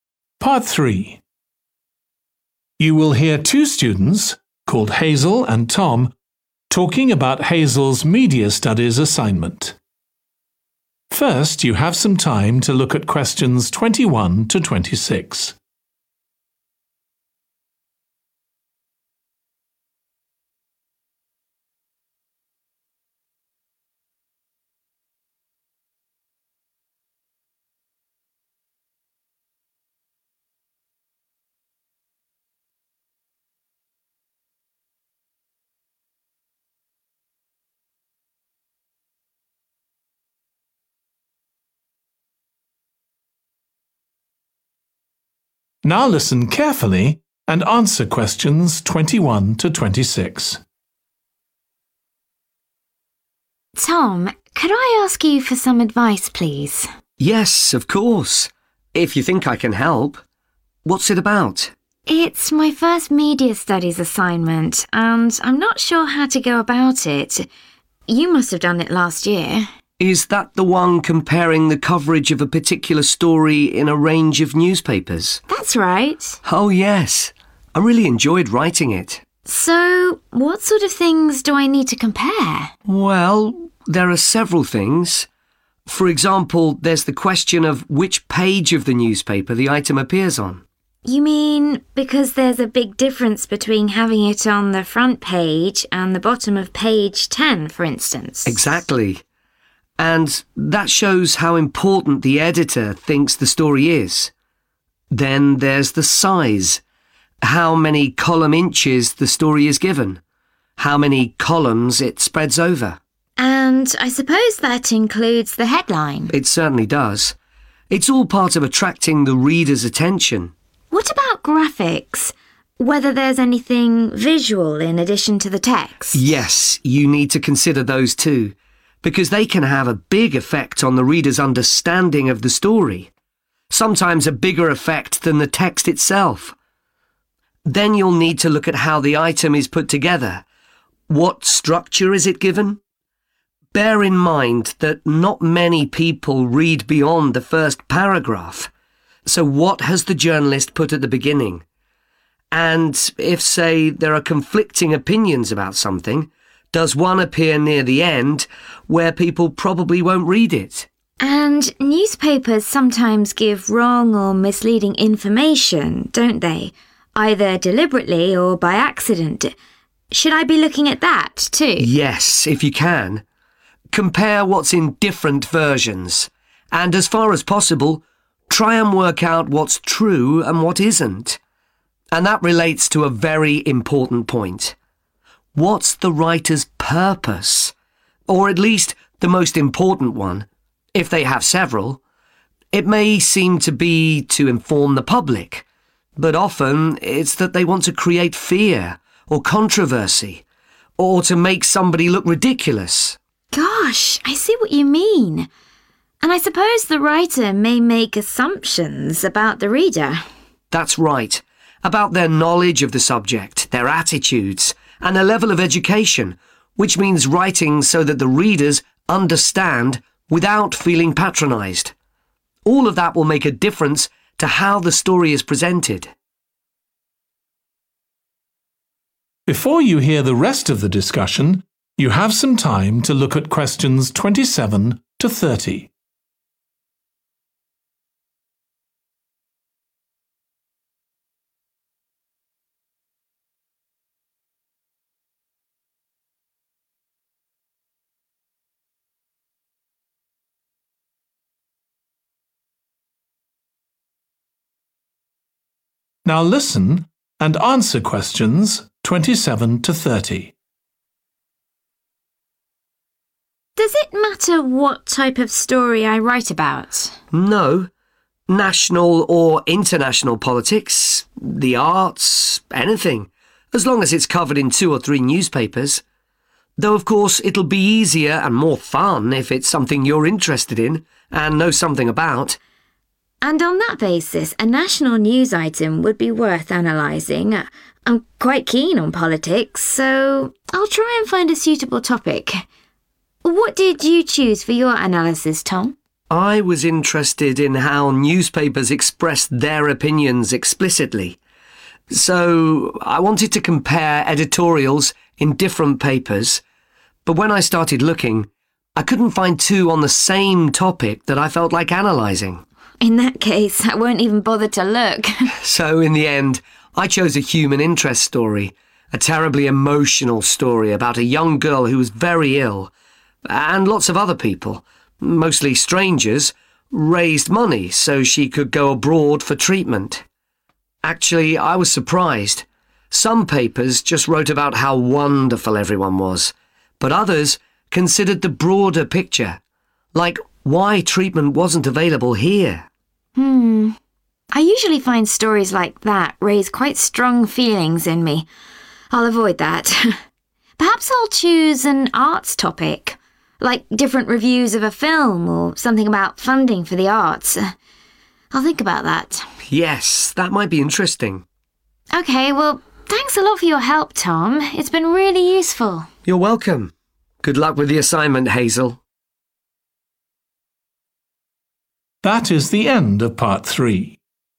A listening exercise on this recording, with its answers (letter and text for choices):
Complete the notes below. Write ONE WORD ONLY for each answer.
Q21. what 21. the item is on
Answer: page

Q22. the 22. of the item, including the headline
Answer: size

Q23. any 23. accompanying the item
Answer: graphic(s)

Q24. the 24. of the item, e.g. what's made prominent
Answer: structure

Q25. the writer's main 25.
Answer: purpose

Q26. the 26. the writer may make about the reader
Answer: assumption(s)

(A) She will definitely look for a suitable article.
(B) She may look for a suitable article.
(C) She definitely won't look for an article.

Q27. national news item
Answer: (A) She will definitely look for a suitable article.

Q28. editorial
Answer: (C) She definitely won't look for an article.

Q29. human interest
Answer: (C) She definitely won't look for an article.

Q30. arts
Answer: (B) She may look for a suitable article.